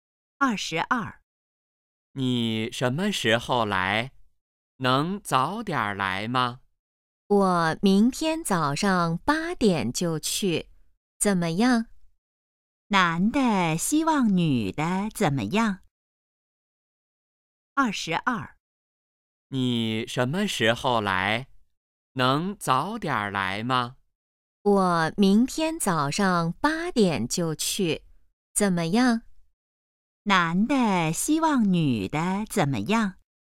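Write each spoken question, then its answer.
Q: 男的希望女的怎么样?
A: 早点来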